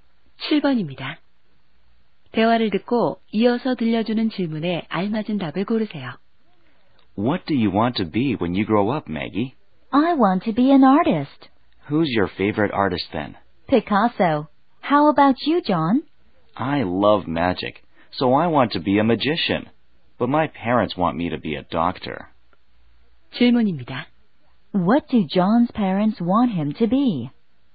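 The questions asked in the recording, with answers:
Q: What do John's parents want him to be?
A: A doctor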